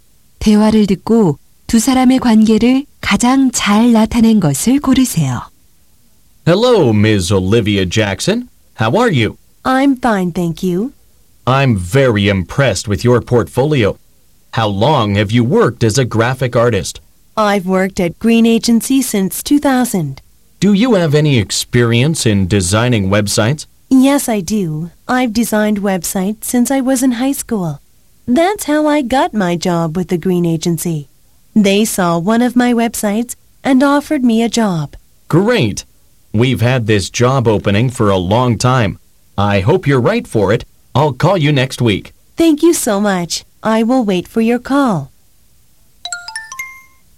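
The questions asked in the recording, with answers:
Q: 대화를 듣고 두 사람의 관계를 가장 잘 나타낸 것을 고르세요.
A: 면접관 - 구직자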